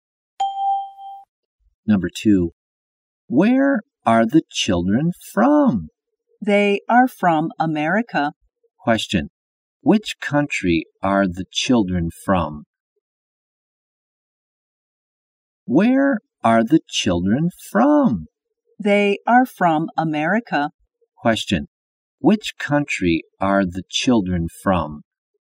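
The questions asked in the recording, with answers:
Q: Which country are the children from?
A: America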